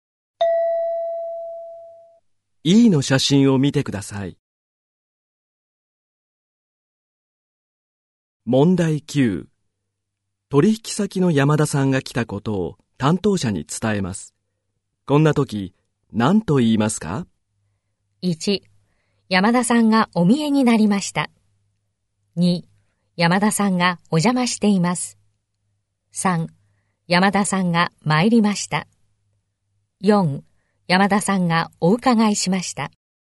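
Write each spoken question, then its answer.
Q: 取引先の山田さんが来たことを担当者に伝えます。こんな時、何と言いますか?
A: 1: 山田さんがお見えになりました。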